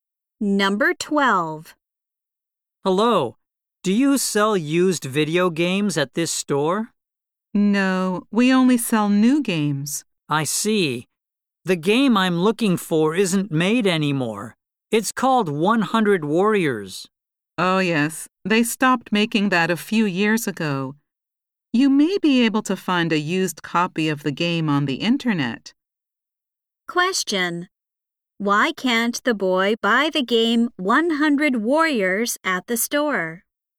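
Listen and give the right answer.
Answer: The store only sells new games and it isn't made anymore.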